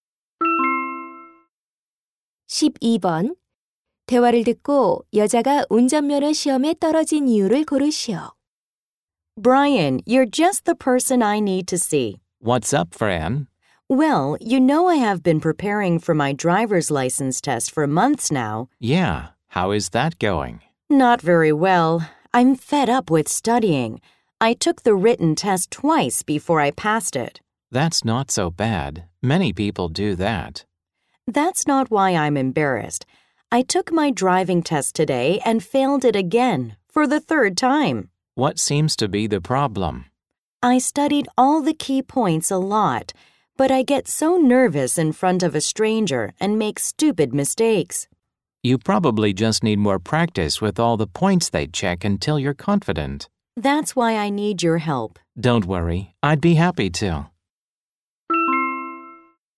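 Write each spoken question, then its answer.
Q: 대화를 듣고 여자가 운전면허 시험에 떨어진 이유를 고르시오.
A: 낯선 사람 앞에서 너무 긴장해서 실수를 해서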